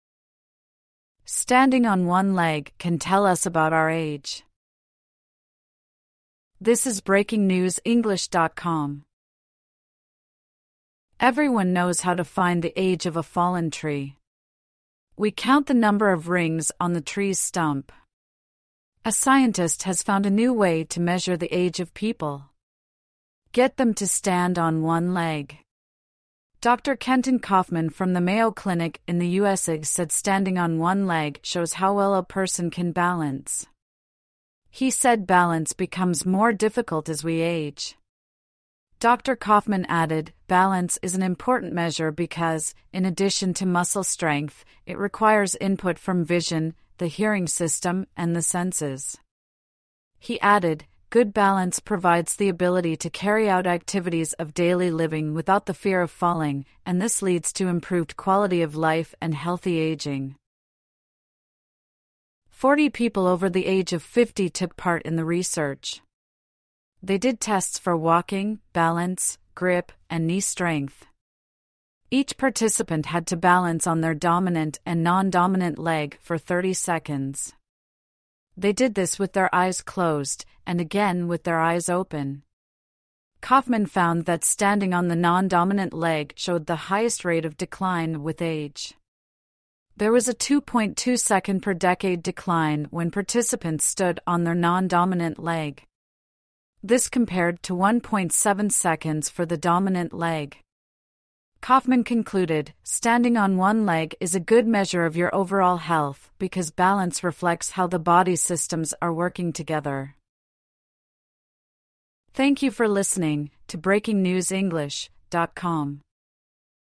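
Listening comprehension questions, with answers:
True / False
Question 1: Very few people know how to find out how old a tree is.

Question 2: Your age is the number of seconds you can balance on one leg.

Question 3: We need balance, muscle, vision and hearing to stand on one leg.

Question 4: Good balance means we do not need to be afraid of falling.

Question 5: Participants in the research were all over 60 years old.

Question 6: People tried to stand on one leg for 30 minutes.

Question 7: People stood on one leg with their eyes opened and closed.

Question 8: Standing on one leg shows how parts of the body work together.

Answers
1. F
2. F
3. T
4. T
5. F
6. F
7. T
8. T

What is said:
Standing on one leg can tell us about our age
Everyone knows how to find the age of a fallen tree. We count the number of rings on the tree's stump. A scientist has found a new way to measure the age of people ... 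get them to stand on one leg. Dr Kenton Kaufman from the Mayo Clinic in the USA said standing on one leg shows how well a person can balance. He said balance becomes more difficult as we age. Dr Kaufman added: "Balance is an important measure because, in addition to muscle strength, it requires input from vision, the [hearing] system, and the [senses]." He added: "Good balance provides the ability to carry out activities of daily living without the fear of falling, and this leads to improved quality of life and healthy ageing."
Forty people over the age of 50 took part in the research. They did tests for walking, balance, grip, and knee strength. Each participant had to balance on their dominant and non-dominant leg for 30 seconds. They did this with their eyes closed, and again with their eyes open. Kaufman found that standing on the non-dominant leg showed the highest rate of decline with age. 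There was a 2.2-second-per-decade decline when participants stood on their non-dominant leg. This compared to 1.7 seconds for the dominant leg. Kaufman concluded: "Standing on one leg is a good measure of your overall health because balance reflects how the body's systems are working together."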